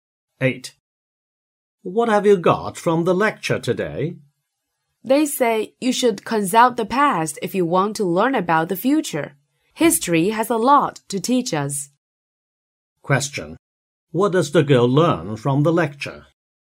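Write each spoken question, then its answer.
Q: What does the girl learn from the lecture?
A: We can learn about the future from history.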